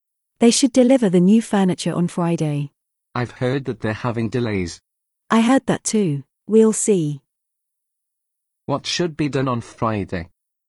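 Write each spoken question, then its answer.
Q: What should be done on Friday?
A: deliver the new furniture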